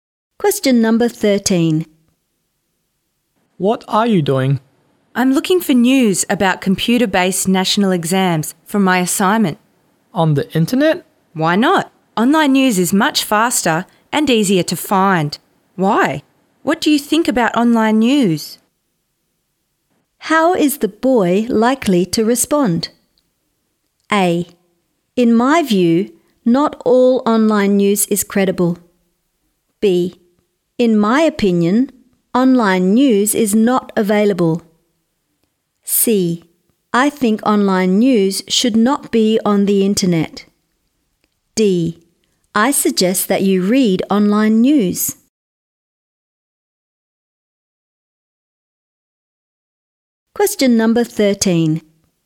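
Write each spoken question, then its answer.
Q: How is the boy likely to respond?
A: A: In my view, not all online news is credible.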